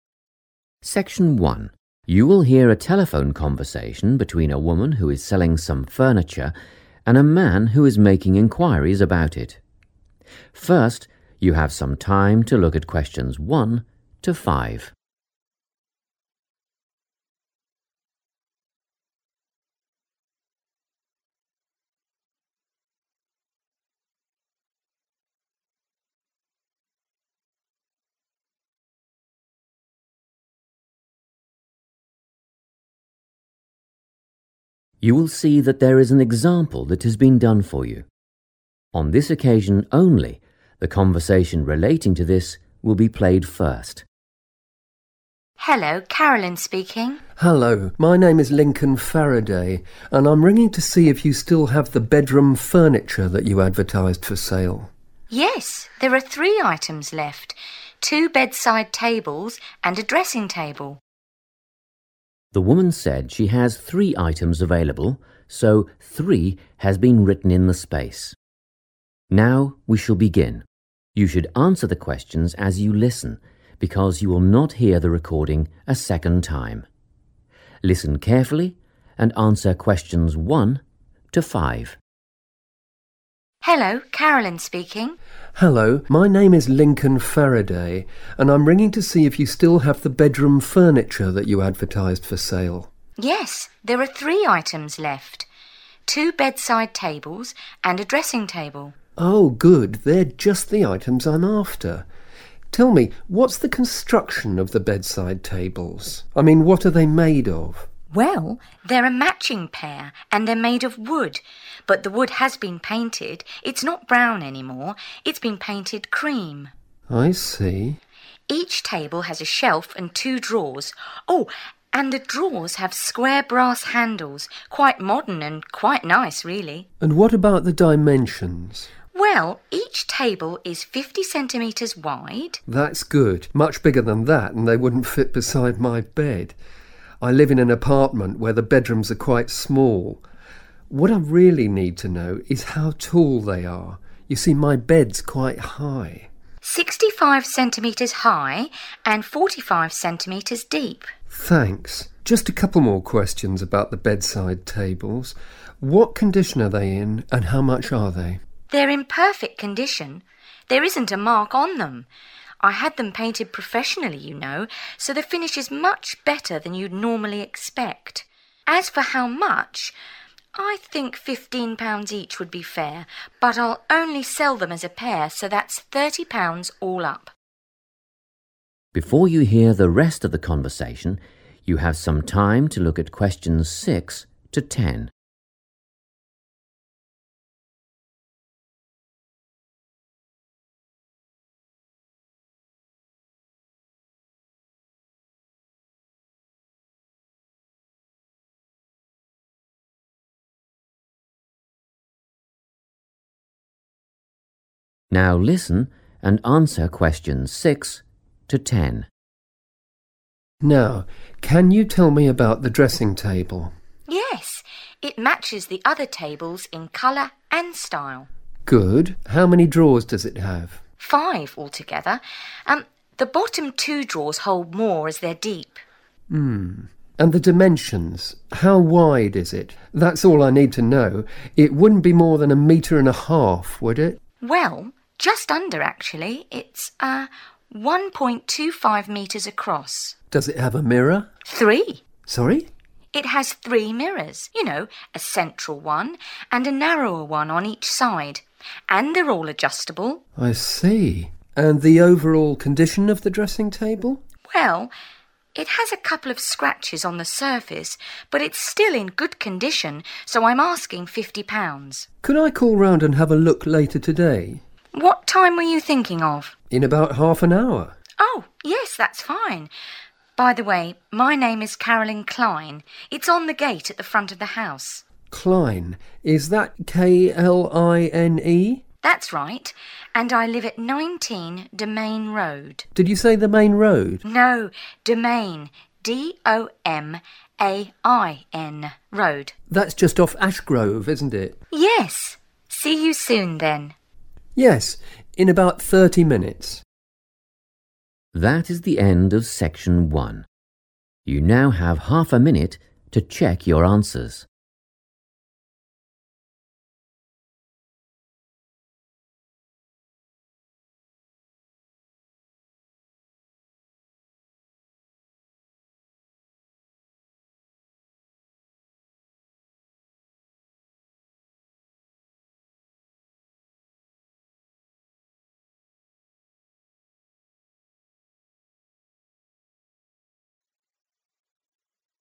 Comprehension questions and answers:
Complete the notes below. Write NO MORE THAN ONE WORD AND/OR A NUMBER for each answer.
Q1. Colour: _____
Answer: cream

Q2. handles made of _____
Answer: brass

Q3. Height: _____ cm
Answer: 65 / sixty-five

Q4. Condition: _____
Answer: perfect

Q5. Price: _____ (for both)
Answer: £30 / 30 pounds

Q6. Drawers: five (two are _____ )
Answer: deep

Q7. Width: _____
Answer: 1.25 metres / 1.25 meters / 1.25 m

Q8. Mirrors: three: one large, two small (all _____ )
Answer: adjustable

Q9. Price: _____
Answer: £50 / 50 pounds

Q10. Address: 19 _____ Road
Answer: Domain

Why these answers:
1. The correct answer is "cream" because the woman describes the bedside tables. She mentions that they are made of wood, but since they have been painted, their color is now cream rather than brown.
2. The correct answer is brass because the woman explicitly describes the bedside tables' details. When talking about the drawers, she mentions the material of the handles by saying they are 'square brass handles.' This matches the requirement to identify what the handles are made of.
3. The correct answer is 65 because the man asks the woman for the measurement of the furniture's height since his bed is quite high. The woman answers that the tables are 65 centimeters high. The words 'tall' and 'high' are used as synonyms for 'height' in this conversation.
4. The correct answer is 'perfect' because the woman describes the tables as being in 'perfect condition' and mentions that there isn't even a single mark on them. This indicates the furniture is in the best possible state.
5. The correct answer is thirty pounds because the seller states that each table costs fifteen pounds, but she will only sell them as a pair (together). This brings the total cost for both items to thirty pounds. The speaker uses the phrase 'all up' to mean the total price.
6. The correct answer is 'deep' because the woman explains that while there are five drawers in total, the bottom two are different because they are 'deep', meaning they have more space inside to hold things.
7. The correct answer is 1.25 metres because the man asks for the width of the dressing table. The woman tells him the size is 1.25 metres. In the conversation, the word 'across' is used to describe the width (how wide something is).
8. The correct answer is 'adjustable' because the woman describes the three mirrors on the dressing table and says they can all be moved. In English, 'adjustable' is a common word used for objects that can be moved into different positions to suit the user. The note asks for a word describing all the mirrors, and the woman specifically uses this term right after describing them.
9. The correct answer is fifty pounds because the woman selling the furniture clearly states this price at the end of the description of the dressing table. She mentions that despite some small scratches, it is still in good condition, and therefore she is asking for fifty pounds.
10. The correct answer is Domain because the woman clearly states her street address. When the man asks if her address is 'the main road', she clarifies and spells out the word 'Domain' to ensure there is no confusion.

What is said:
Test 3
You will hear a number of different recordings and you will have to answer questions on what you hear. There will be time for you to read the instructions and questions and you will have a chance to check your work. All the recordings will be played once only. The test is in 4 sections. At the end of the test you will be given 10 minutes to transfer your answers to an answer sheet. Now turn to section 1.
Section 1
You will hear a telephone conversation between a woman who is selling some furniture and a man who is making enquiries about it. First, you have some time to look at questions 1 to 5.
You will see that there is an example that has been done for you. On this occasion only the conversation relating to this will be played first.
WOMAN: Hello, Carolyn speaking.
MAN: Hello. My name is Lincoln Farraday and I'm ringing to see if you still have the bedroom furniture that you advertised for sale?
WOMAN: Yes, there are three items left - two bedside tables and a dressing table.
The woman said she has three items available so three has been written in the space. Now we shall begin. You should answer the questions as you listen because you will not hear the recording a second time. Listen carefully and answer questions 1 to 5.
WOMAN: Hello, Carolyn speaking.
MAN: Hello.
They're just the items I'm after. Tell me, what's the construction of the bedside tables - I mean, what are they made of?
WOMAN: Well, they're a matching pair and they're made of wood - but the wood has been painted, it's not brown anymore, it's been painted cream.
MAN: I see.
WOMAN: Each table has a shelf and 2 drawers. Oh, and the drawers have square brass handles - quite modern and quite nice really.
MAN: And what about the dimensions?
WOMAN: Well, each table is 50 centimetres wide ...
MAN: That's good, much bigger than that and they wouldn't fit beside my bed. I live in an apartment where the bedrooms are quite small. What I really need to know is how tall they are - you see my bed's quite high.
WOMAN: 65 centimetres high and 45 centimetres deep.
MAN: Thanks. Just a couple more questions about the bedside tables, what condition are they in and how much are they?
WOMAN: They're in perfect condition - there isn't a mark on them, you know. I had them painted professionally, you see, so the finish is much better than you'd normally expect. As for how much ... well, I guess ... I think fifteen pounds each would be a fair price, but I've decided that I'll only sell them together, as a pair, so that means the price is thirty pounds all up.
Before you hear the rest of the conversation, you have some time to look at questions 6 to 10.
Now listen and answer questions 6 to 10.
MAN: Now, can you tell me about the dressing table?
WOMAN: Yes, it matches the other tables in colour and style.
MAN: Good - how many drawers does it have?
WOMAN: Five altogether. Um ... the bottom two drawers hold more as they're deep.
and the dimensions - how wide is it? That's all I need to know - it wouldn't be more than a metre and a half, would it?
WOMAN: Well, just under actually ... it's ... ah, 1.25 metres across.
MAN: Does it have a mirror?
WOMAN: Three.
MAN: Sorry?
WOMAN: It has three mirrors - you know ... a central one and a narrower one on each side. And they're all adjustable.
MAN: I see - and the overall condition of the dressing table?
WOMAN: Well, it has a couple of scratches on the surface but it's still in good condition so I'm asking fifty pounds.
MAN: Could I call round and have a look later today?
WOMAN: What time were you thinking of?
MAN: In about half an hour ...
WOMAN: Oh, yes, that's fine. By the way, my name is Carolyn Kline - it's on the gate at the front of the house.
MAN: Kline - is that K-L-I-N-E?
WOMAN: That's right. And I live at 19 Domain Road.
MAN: Did you say the main road?
WOMAN: No, Domain - D-O-M-A-I-N Road.
MAN: That's just off Ash Grove, isn't it?
WOMAN: Yes. See you soon then ...
MAN: Yes, in about 30 minutes.
That is the end of section 1. You now have half a minute to check your answers.